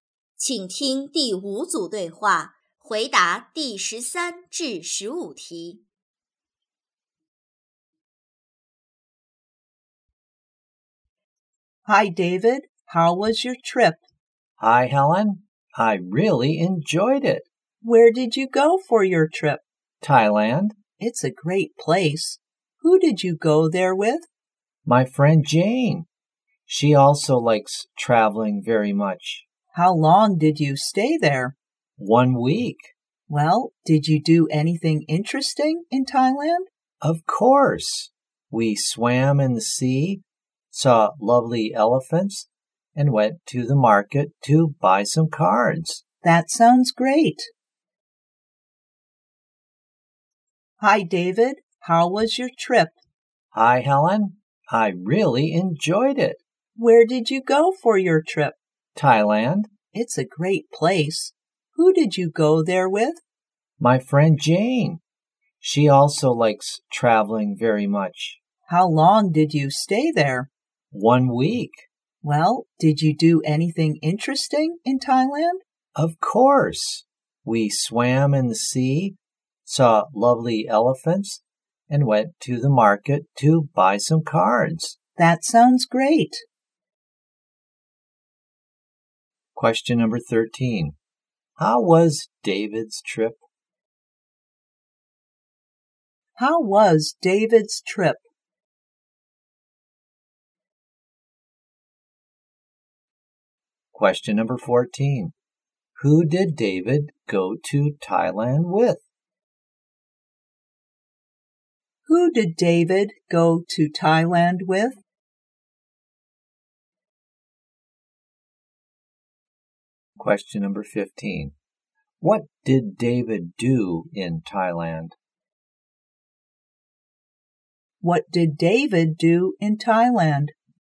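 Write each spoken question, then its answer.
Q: How was David's trip?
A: He really enjoyed it.

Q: Who did David go to Thailand with?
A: His friend Jane.

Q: What did David do in Thailand?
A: He swam in the sea, saw elephants and bought cards at the market.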